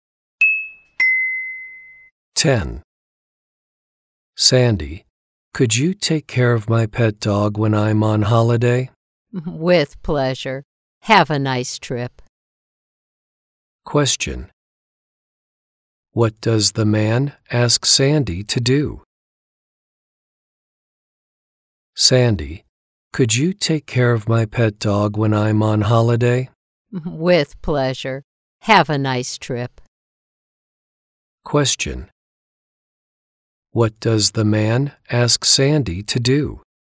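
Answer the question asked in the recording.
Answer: Take care of his pet dog while he is on holiday.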